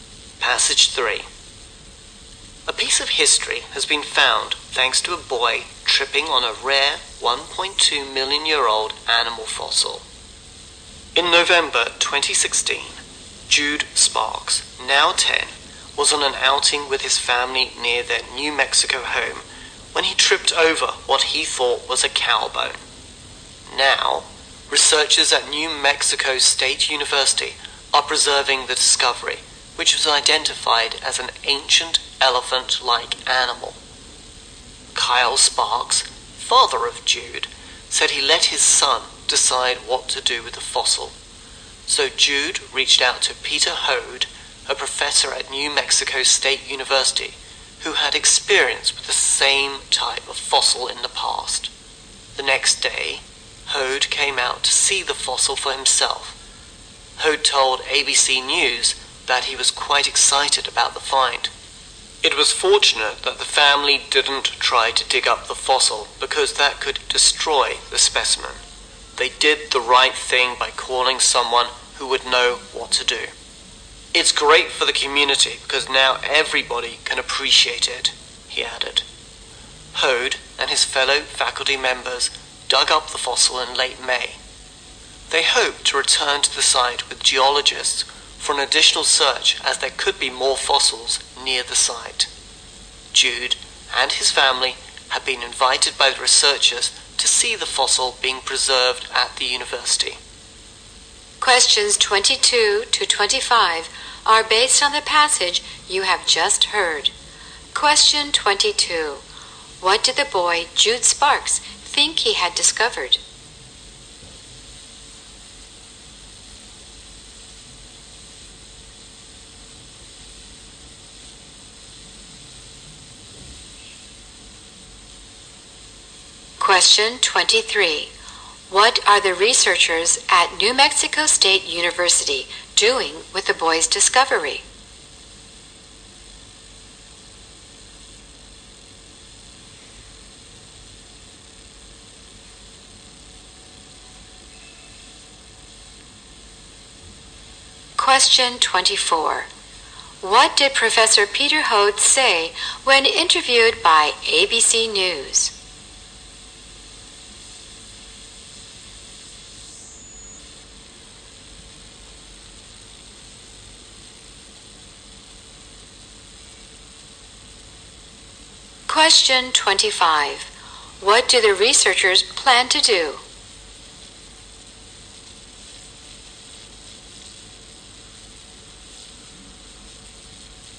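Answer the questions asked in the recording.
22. A cow bone.
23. Preserving it.
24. He was quite excited about the find.
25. Return to the site with geologists to search for more fossils.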